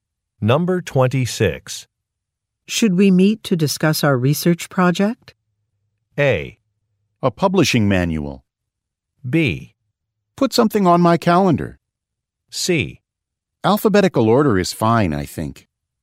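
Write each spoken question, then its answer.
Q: Should we meet to discuss our research project?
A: B: Put something on my calendar.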